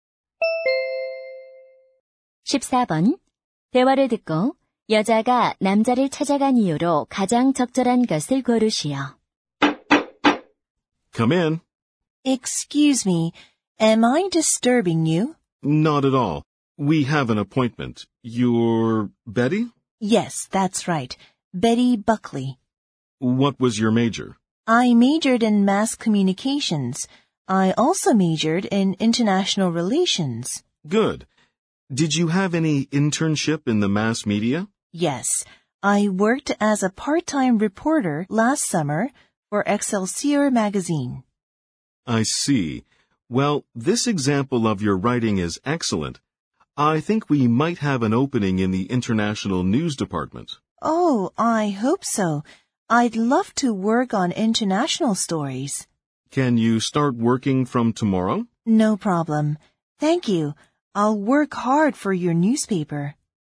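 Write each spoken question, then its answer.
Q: 대화를 듣고 여자가 남자를 찾아간 이유로 가장 적절한 것을 고르시오.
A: 신문사 취업 면접을 보려고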